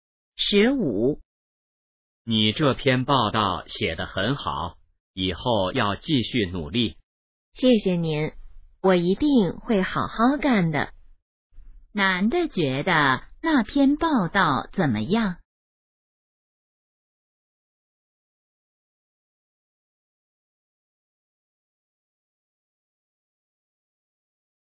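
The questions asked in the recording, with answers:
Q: 男的觉得那篇报道怎么样?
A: 写得很好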